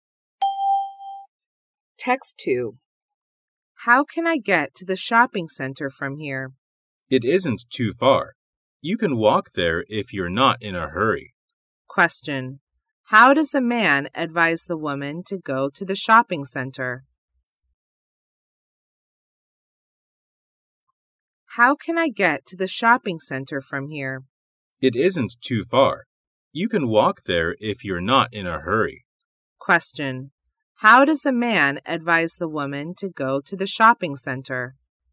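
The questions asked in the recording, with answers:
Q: How does the man advise the woman to go to the shopping center?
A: On foot (walk there)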